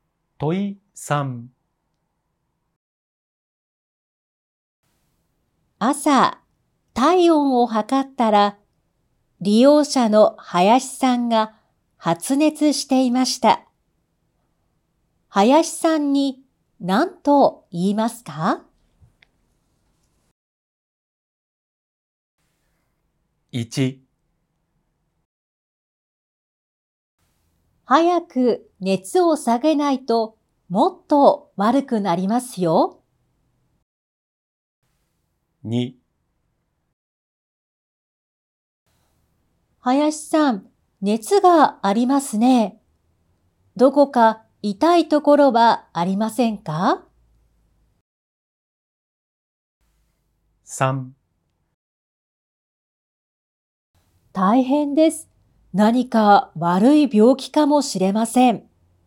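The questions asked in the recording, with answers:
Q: 林さんに何と言いますか?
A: 2: 林さん、熱がありますね。どこか痛いところはありませんか?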